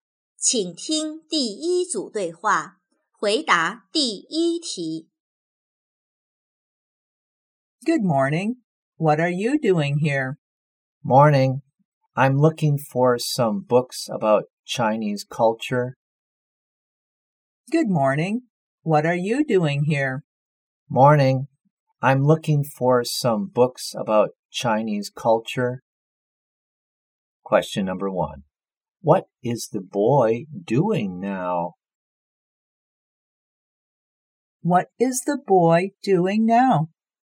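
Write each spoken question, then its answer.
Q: What is the boy doing now?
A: Looking for some books about Chinese culture.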